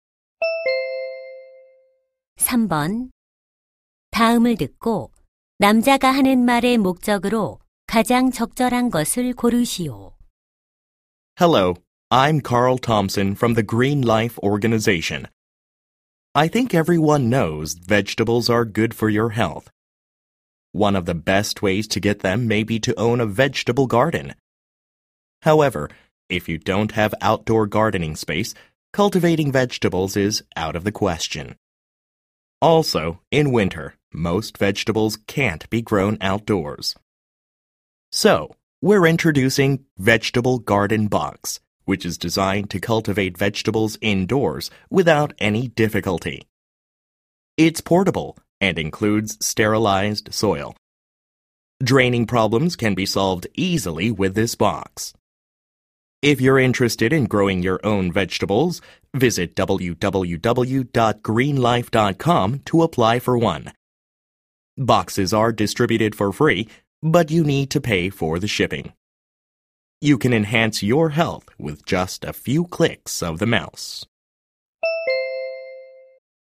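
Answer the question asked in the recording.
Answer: 실내용 채소 재배 상자(Vegetable Garden Box) 신청을 홍보하려고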